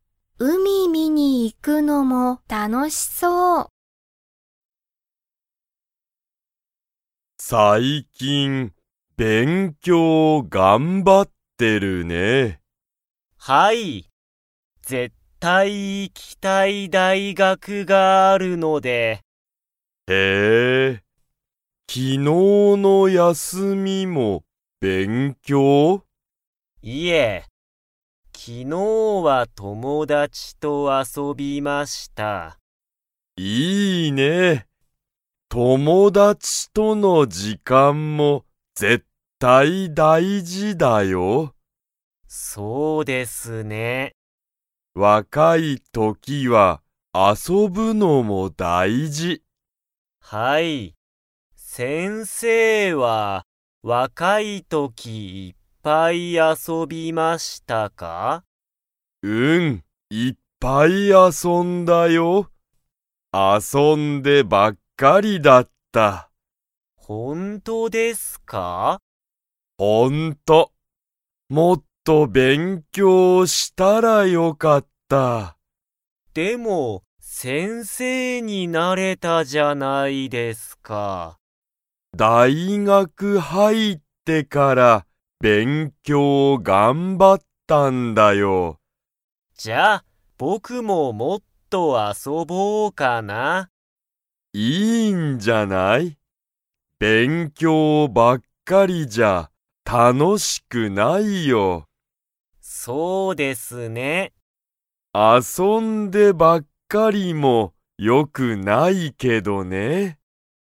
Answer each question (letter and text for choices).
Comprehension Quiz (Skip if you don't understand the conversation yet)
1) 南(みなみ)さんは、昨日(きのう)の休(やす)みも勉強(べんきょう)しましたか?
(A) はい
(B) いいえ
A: (B) いいえ

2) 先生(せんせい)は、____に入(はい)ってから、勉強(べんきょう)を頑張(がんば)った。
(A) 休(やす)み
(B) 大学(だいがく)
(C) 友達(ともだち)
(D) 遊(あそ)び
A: (B) 大学(だいがく)

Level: Level 2